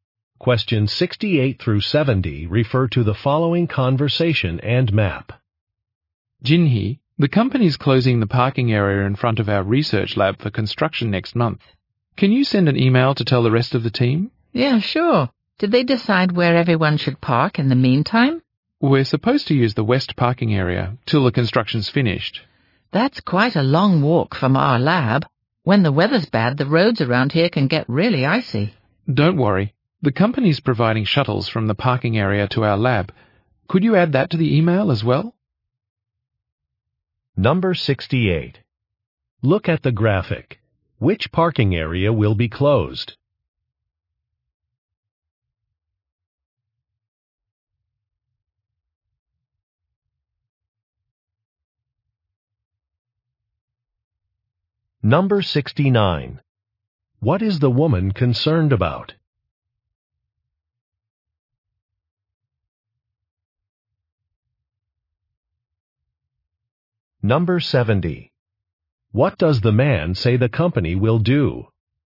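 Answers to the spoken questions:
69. The long walk on icy roads
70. Provide shuttles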